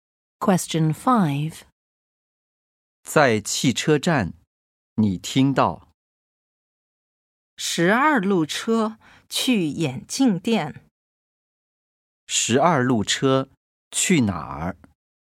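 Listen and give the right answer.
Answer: 眼镜店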